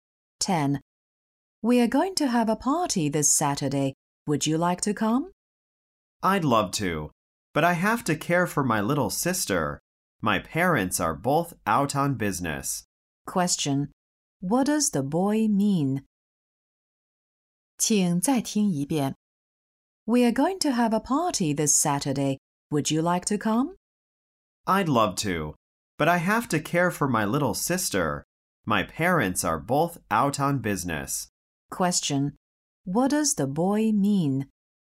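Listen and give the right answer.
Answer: He can't come to the party because he has to look after his little sister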